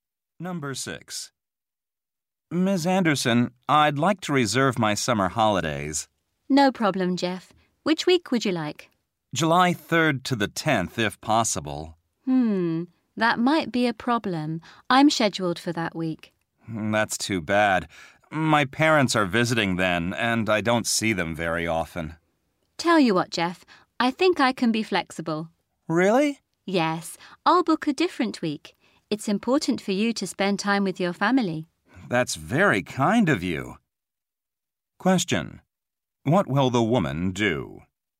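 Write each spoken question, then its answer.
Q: What will the woman do?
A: Take her holiday in a different week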